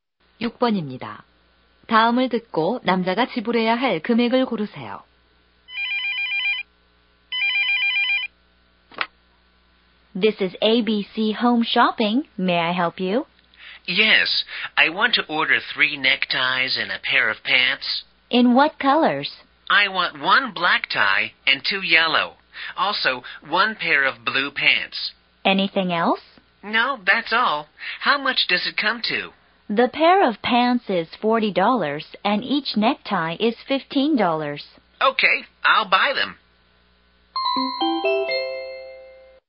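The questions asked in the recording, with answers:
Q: 다음을 듣고 남자가 지불해야 할 금액을 고르세요.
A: 85달러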